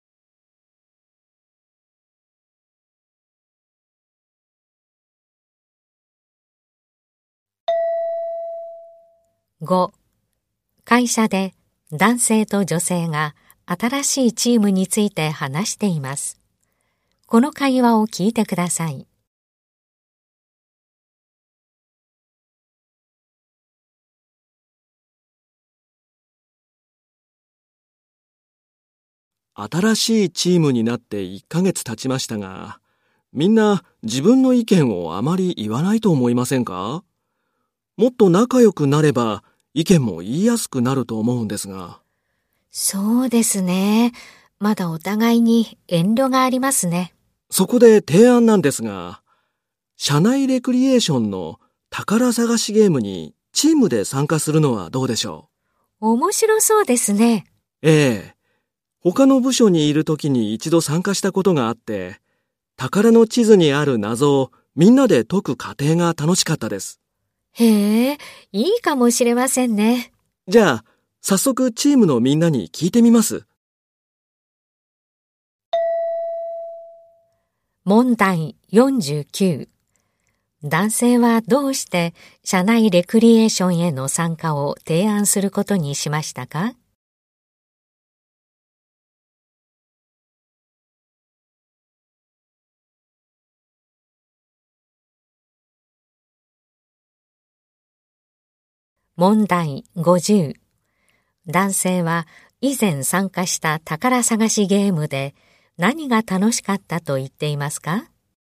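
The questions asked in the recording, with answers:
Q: 男性はどうして社内レクリエーションへの参加を提案することにしましたか?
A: チームのみんなが意見をあまり言わないので、仲良くなって意見を言いやすくするため

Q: 男性は以前参加した宝探しゲームで 何が楽しかったと言っていますか?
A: 宝の地図の謎をみんなで解く過程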